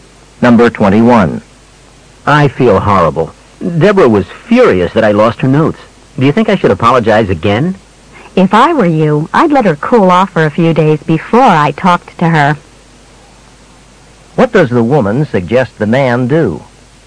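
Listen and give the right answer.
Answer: Wait a few days before talking to Deborah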